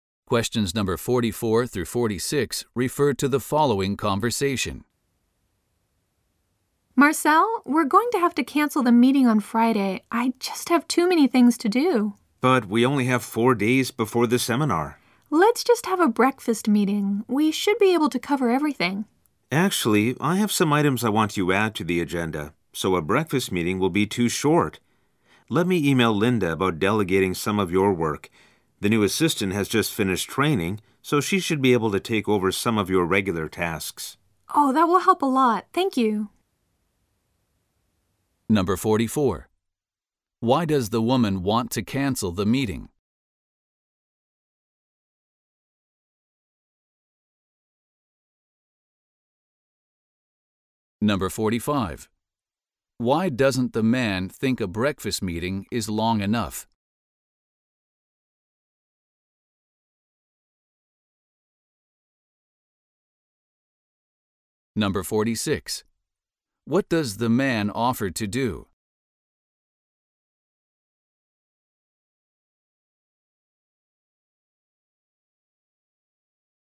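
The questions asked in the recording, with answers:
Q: Why does the woman want to cancel the meeting?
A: She has too many things to do.

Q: Why doesn't the man think a breakfast meeting is long enough?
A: He has items he wants added to the agenda.

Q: What does the man offer to do?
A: Email Linda about delegating some of the woman's work.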